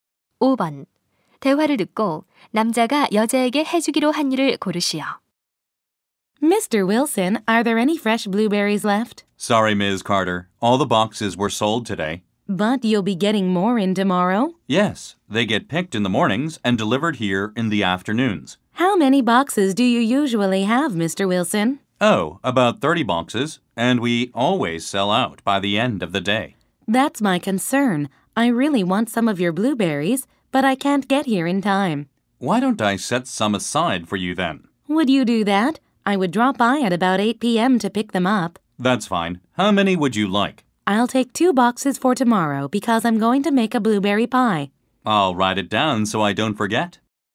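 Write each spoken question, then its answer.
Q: 대화를 듣고 남자가 여자에게 해주기로 한 일을 고르시오.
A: 블루베리 두 상자를 따로 남겨 두기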